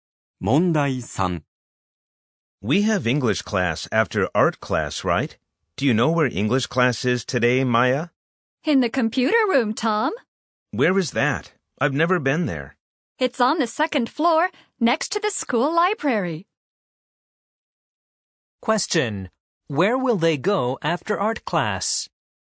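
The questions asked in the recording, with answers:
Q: Where will they go after art class?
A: To the computer room (on the second floor, next to the school library)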